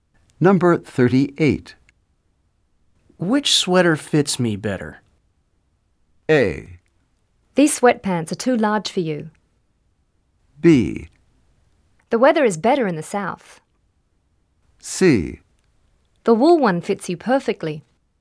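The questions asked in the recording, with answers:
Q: Which sweater fits me better?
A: C: The wool one fits you perfectly.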